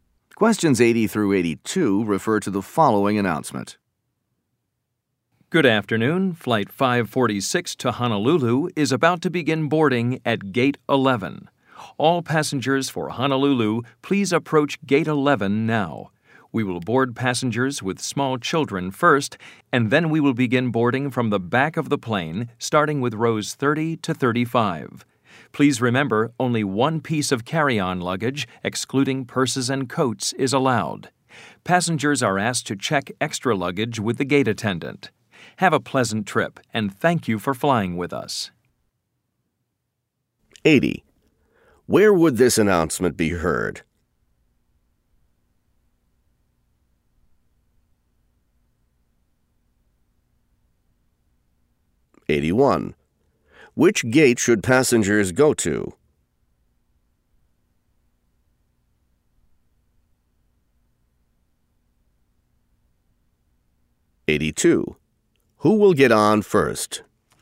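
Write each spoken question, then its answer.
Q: Where would this announcement be heard?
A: At an airport

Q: Which gate should passengers go to?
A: Gate 11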